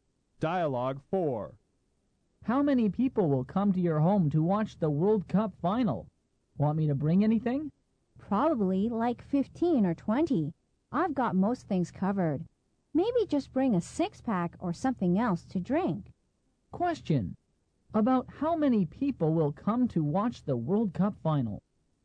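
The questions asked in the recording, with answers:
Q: About how many people will come to watch the World Cup final?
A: 15 or 20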